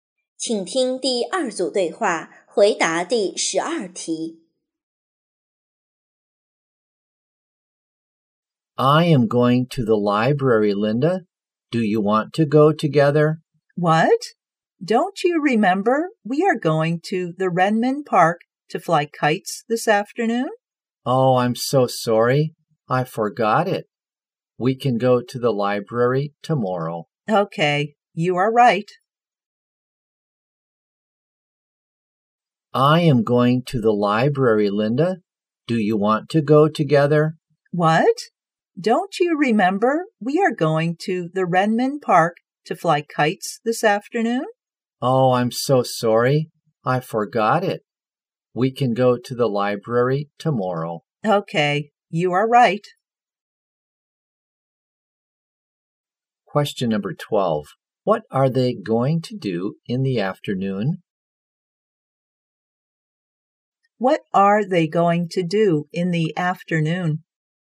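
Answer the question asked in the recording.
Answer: Fly kites in Renmin Park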